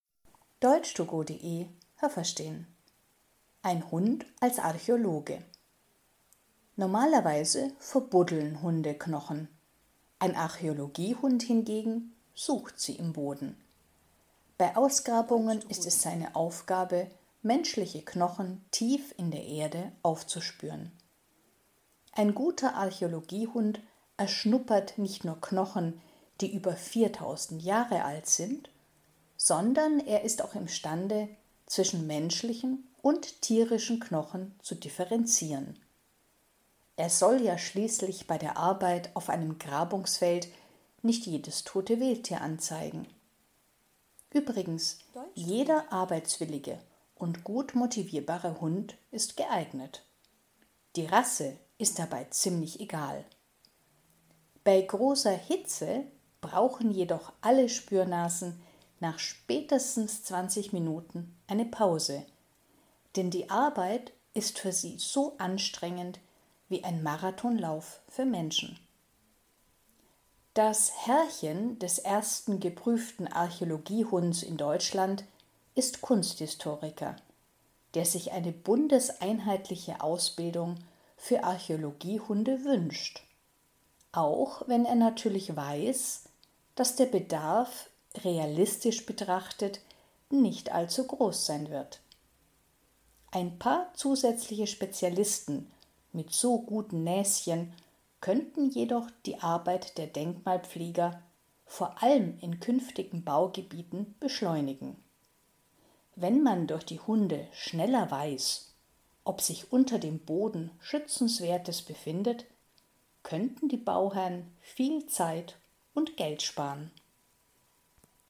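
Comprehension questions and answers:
Haben Sie das gehört? Stimmt diese Aussage?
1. Archäologiehunde buddeln Knochen aus, die tief in der Erde liegen.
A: Ja, das habe ich gehört.

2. Archäologiehunde können Knochen aufspüren, die 4.000 Jahre alt sind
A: Ja, das habe ich gehört.

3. Archäologiehunde sind nicht in der Lage, zwischen menschlichen und tierischen Knochen zu unterscheiden.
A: Nein, das habe ich nicht gehört.

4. Jeder eifrige Hund, der Interesse zeigt, kann zum Archäologiehund ausgebildet werden.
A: Ja, das habe ich gehört.

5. Ist es sehr heiß, dann kann ein Hund höchstens 20 Minuten am Stück arbeiten.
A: Ja, das habe ich gehört.

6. Der Bedarf an Archäologiehunden ist enorm, deshalb ist eine bundeseinheitliche Ausbildung wünschenswert.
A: Nein, das habe ich nicht gehört.

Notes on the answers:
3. Sie lernen, menschliche und tierische Knochen zu differenzieren.
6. Der Bedarf hält sich in Grenzen, aber ein paar zusätzliche Archäologiehunde wären praktisch.

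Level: C1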